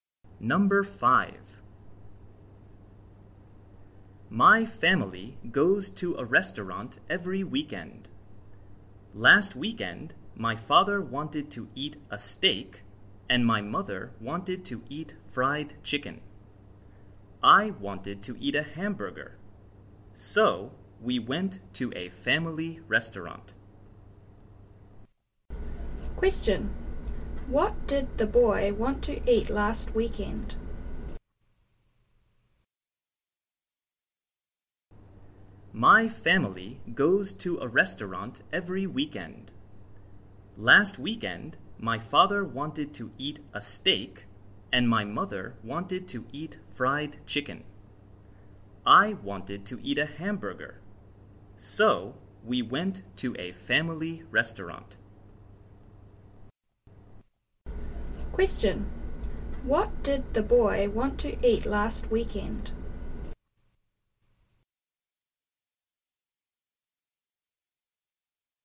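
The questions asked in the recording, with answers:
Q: What did the boy want to eat last weekend?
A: A hamburger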